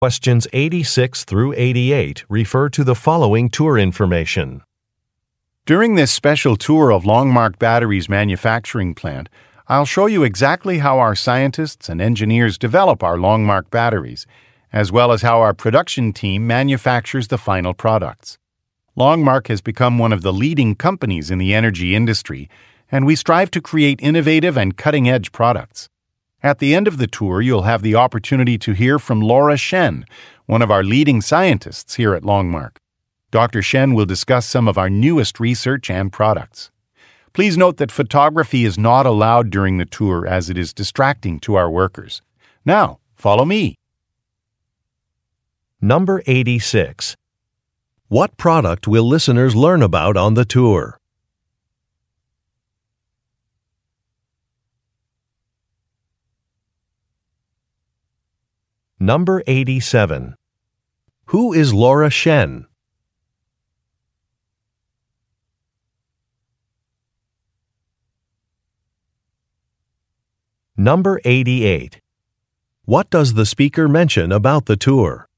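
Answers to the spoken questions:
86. Batteries
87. A scientist
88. Photography is not allowed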